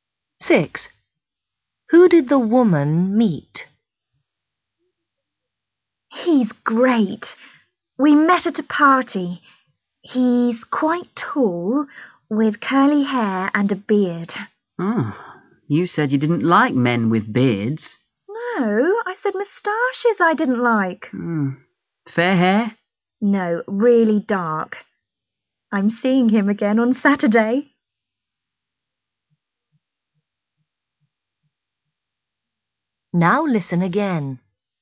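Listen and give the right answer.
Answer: A tall man with curly dark hair and a beard (no moustache)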